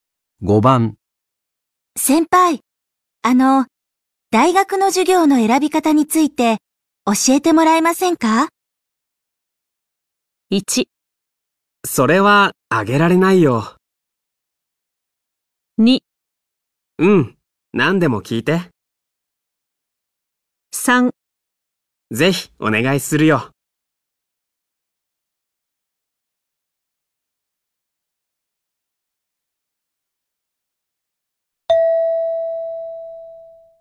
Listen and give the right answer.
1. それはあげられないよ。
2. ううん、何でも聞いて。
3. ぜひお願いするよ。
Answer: 2. ううん、何でも聞いて。

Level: N4 Listening · Test 1